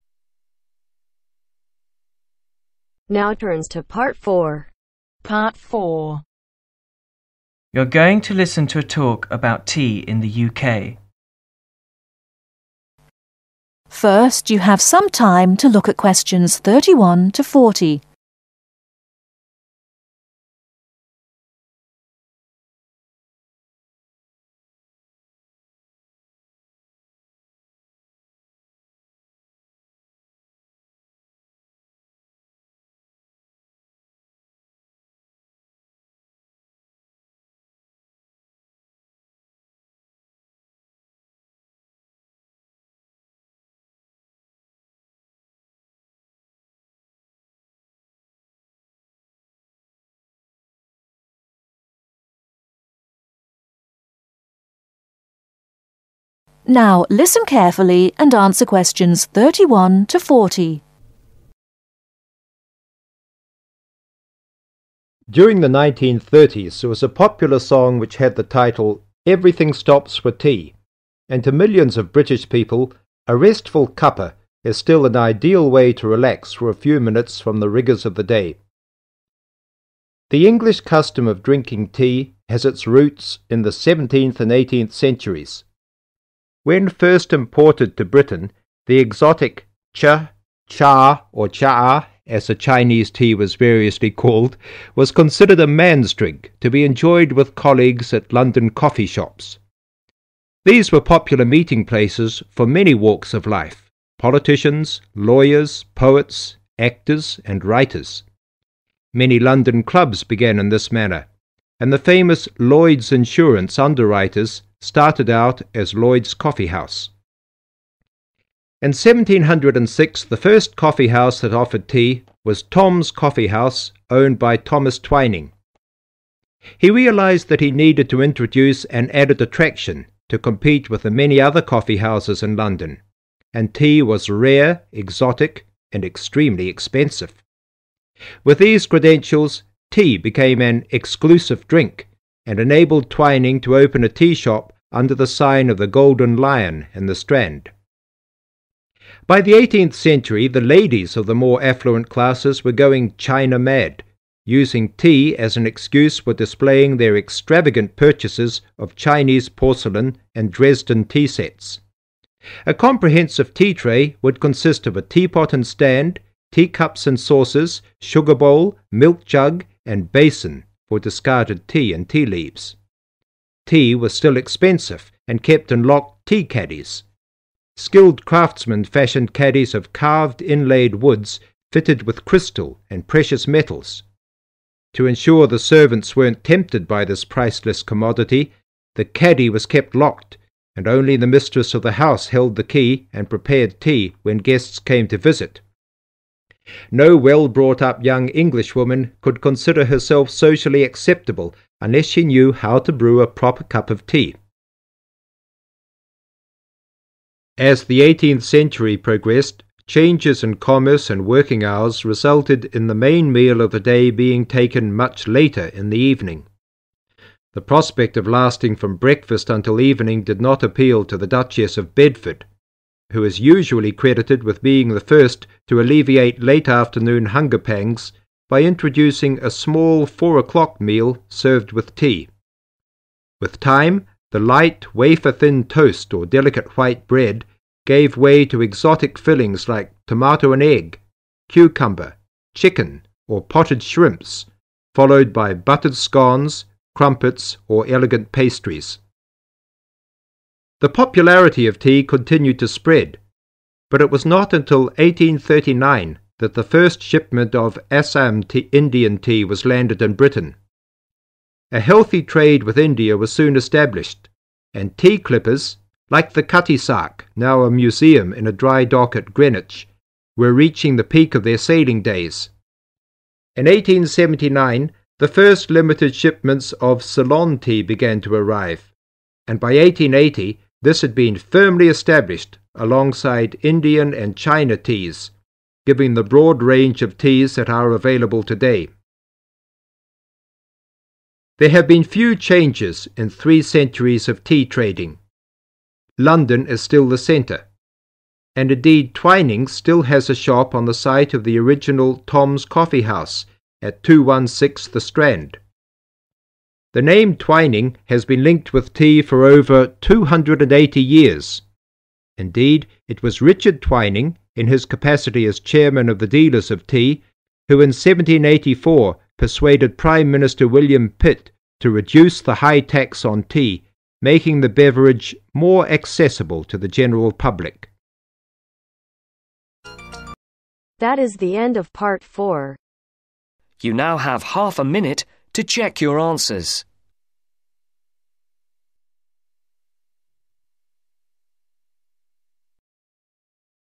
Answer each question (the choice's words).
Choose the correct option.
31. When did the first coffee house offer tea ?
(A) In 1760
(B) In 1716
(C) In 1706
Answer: In 1706

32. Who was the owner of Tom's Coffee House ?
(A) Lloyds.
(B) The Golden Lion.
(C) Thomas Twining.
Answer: Thomas Twining.

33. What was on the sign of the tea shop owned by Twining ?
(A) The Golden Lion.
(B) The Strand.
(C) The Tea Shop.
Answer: The Golden Lion.

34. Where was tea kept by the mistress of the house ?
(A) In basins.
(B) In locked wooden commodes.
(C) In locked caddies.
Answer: In locked caddies.

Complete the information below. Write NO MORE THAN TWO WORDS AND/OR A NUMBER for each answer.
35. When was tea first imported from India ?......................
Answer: In 1839

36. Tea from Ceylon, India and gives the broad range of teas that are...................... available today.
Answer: China

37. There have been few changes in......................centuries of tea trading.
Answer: Three

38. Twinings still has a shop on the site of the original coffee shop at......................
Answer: 216 The Strand

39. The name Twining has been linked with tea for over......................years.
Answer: 280